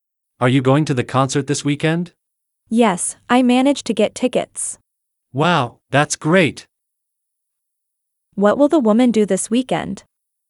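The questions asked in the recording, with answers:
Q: What will the woman do this weekend?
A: Go to the concert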